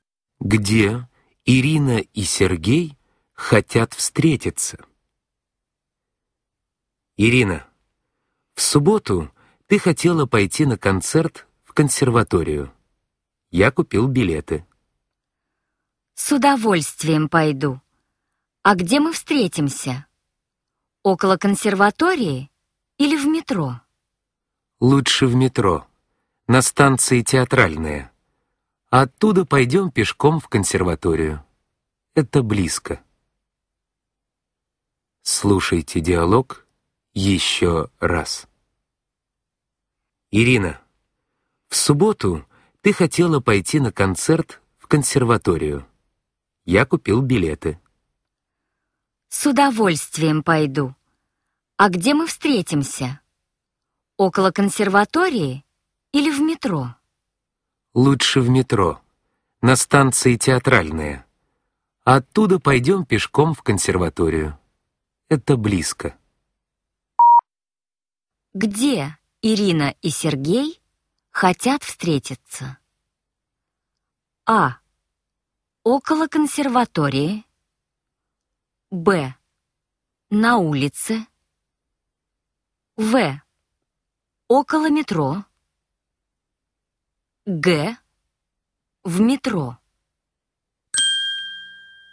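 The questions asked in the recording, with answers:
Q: Где Ирина и Сергей хотят встретиться?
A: Г: В метро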